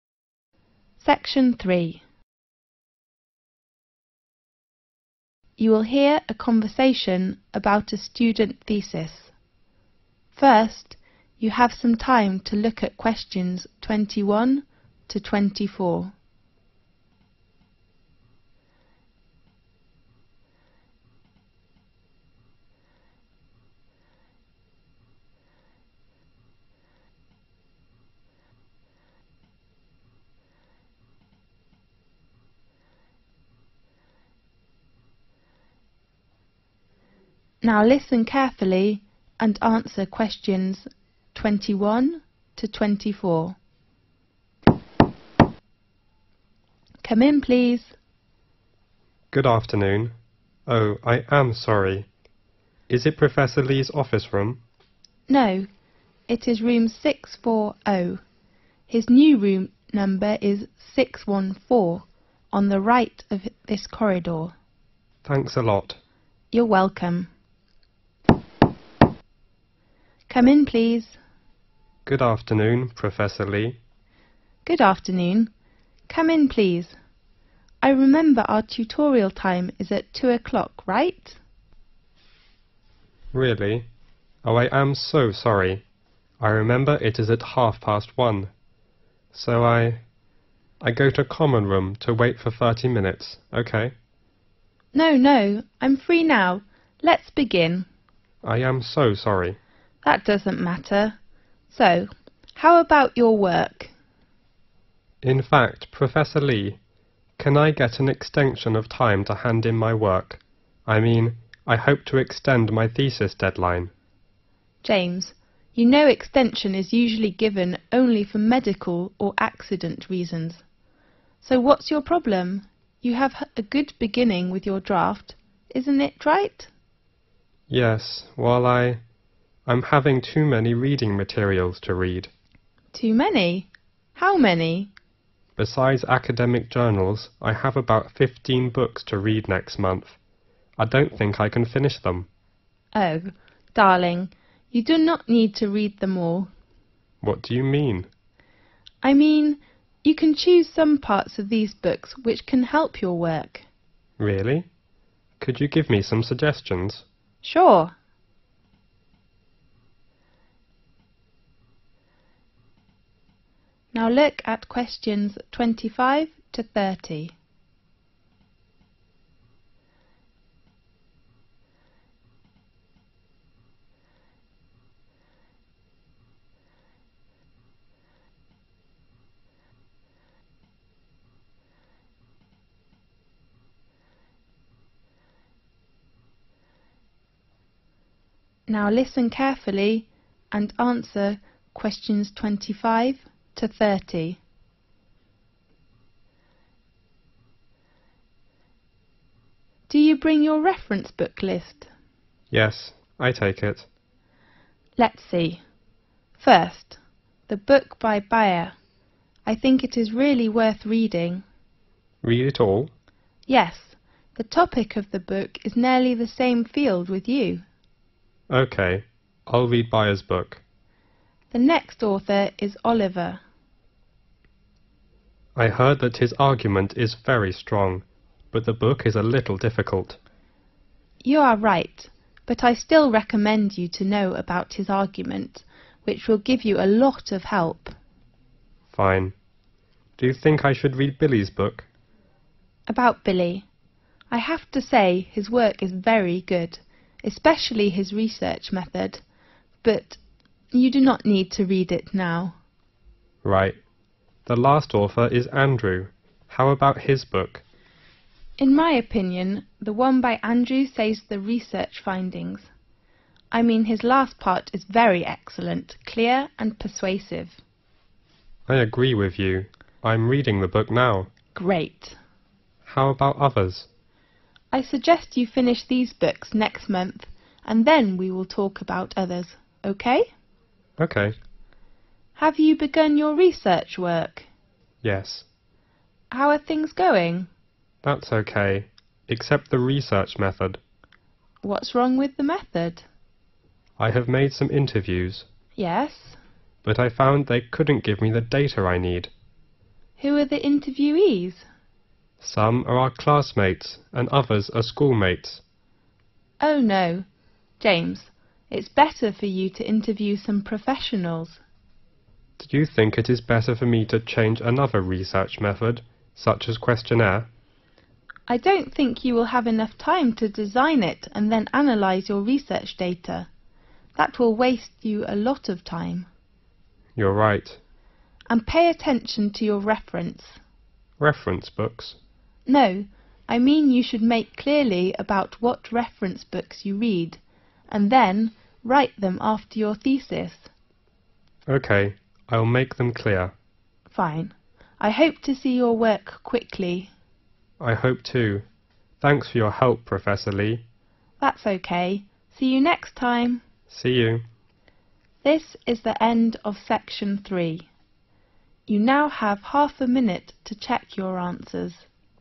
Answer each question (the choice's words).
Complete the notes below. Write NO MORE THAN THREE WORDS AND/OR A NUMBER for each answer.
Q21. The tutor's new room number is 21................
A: 614

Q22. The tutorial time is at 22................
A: 2 p.m

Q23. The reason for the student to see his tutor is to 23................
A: extend thesis deadline

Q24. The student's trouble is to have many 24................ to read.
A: reading materials

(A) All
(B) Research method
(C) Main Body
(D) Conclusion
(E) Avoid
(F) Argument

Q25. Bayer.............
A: All

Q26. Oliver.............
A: Argument

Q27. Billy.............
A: Avoid

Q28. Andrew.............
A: Conclusion